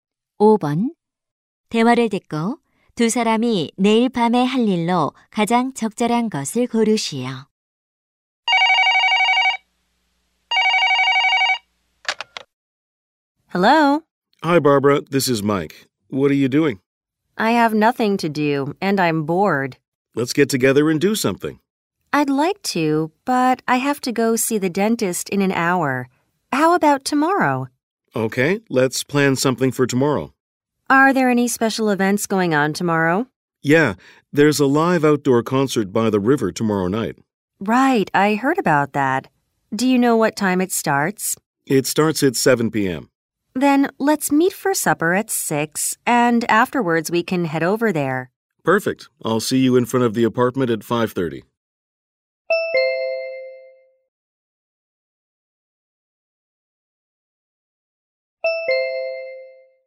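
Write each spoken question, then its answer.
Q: 대화를 듣고 두 사람이 내일 밤에 할 일로 가장 적절한 것을 고르시오.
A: 저녁 식사 후 야외 콘서트 관람하기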